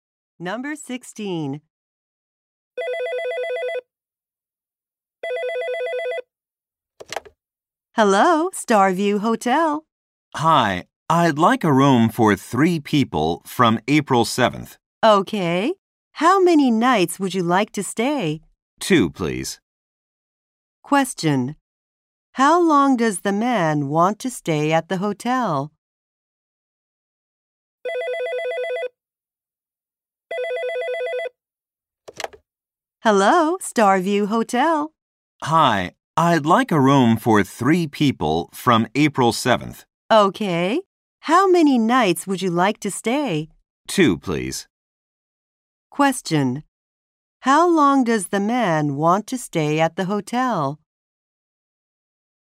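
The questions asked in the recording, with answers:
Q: How long does the man want to stay at the hotel?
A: Two nights.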